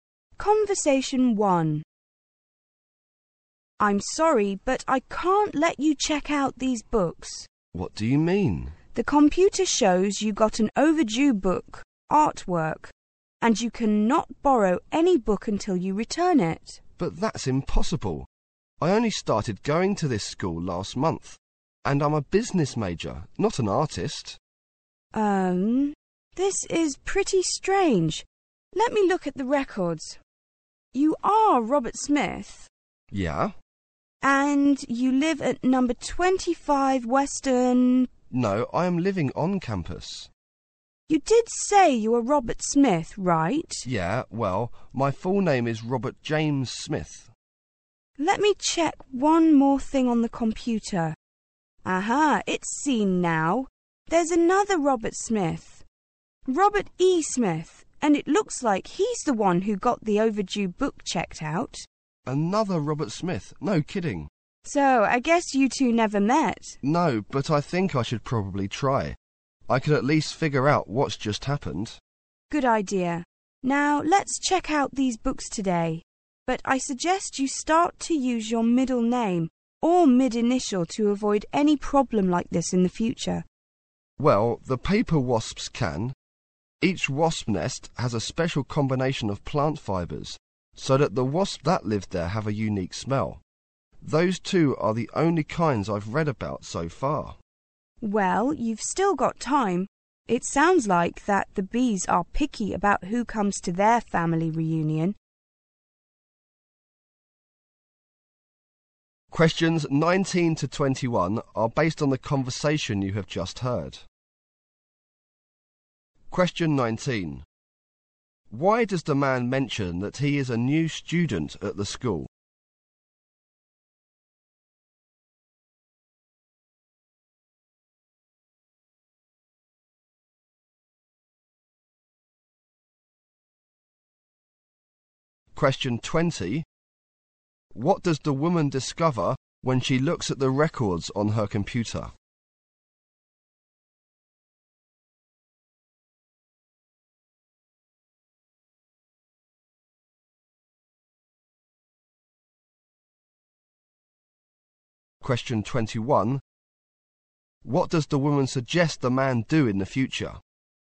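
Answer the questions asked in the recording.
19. To show he can't have an overdue book
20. There is another student called Robert Smith.
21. Use his middle name or middle initial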